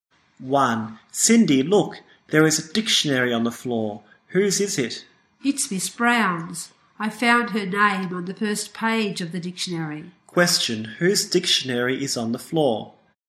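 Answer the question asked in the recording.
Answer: Miss Brown's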